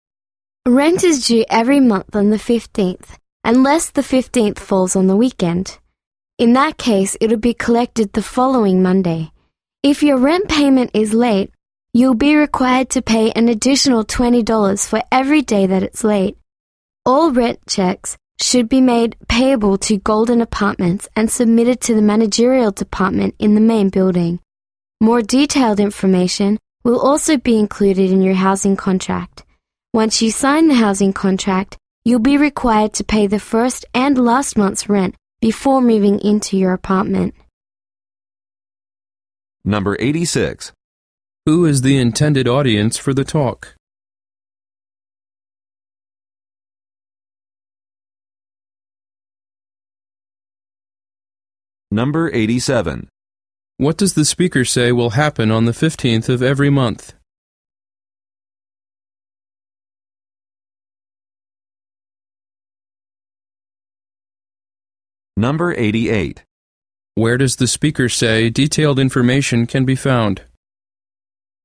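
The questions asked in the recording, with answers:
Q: What does the speaker say will happen on the 15th of every month?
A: Rent will be collected

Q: Where does the speaker say detailed information can be found?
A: In the housing contract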